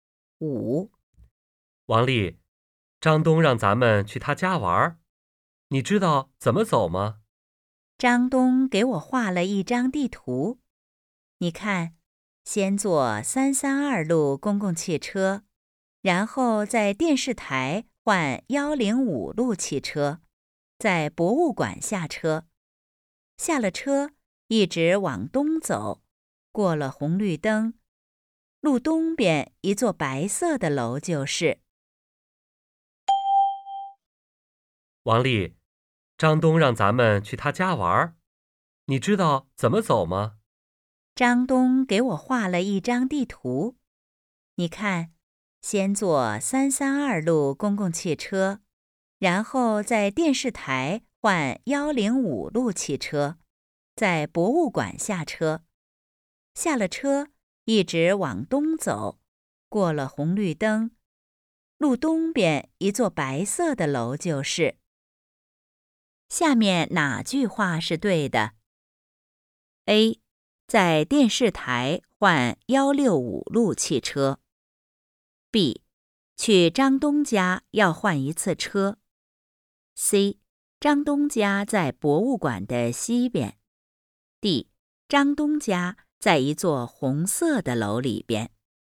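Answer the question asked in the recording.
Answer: B: 去张东家要换一次车。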